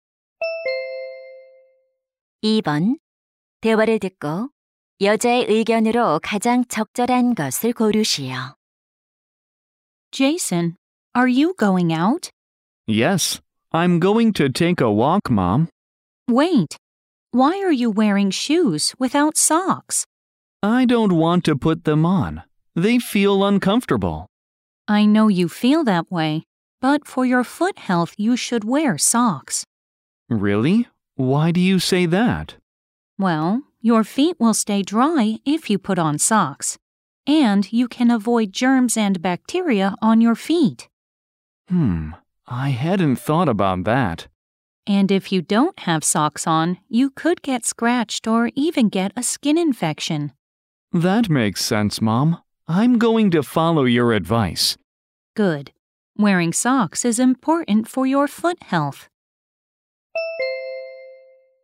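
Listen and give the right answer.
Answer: 발 건강을 위해 양말을 신어야 한다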